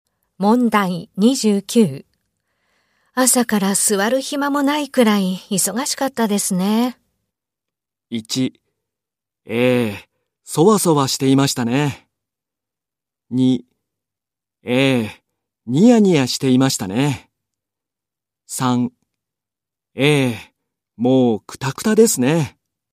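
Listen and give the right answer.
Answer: 3: ええ、もうクタクタですね。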